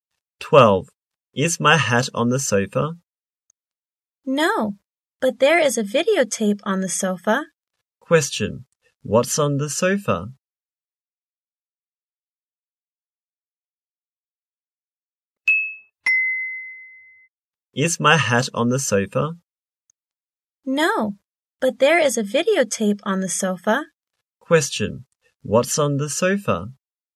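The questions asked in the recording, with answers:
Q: Question, what's on the sofa?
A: A videotape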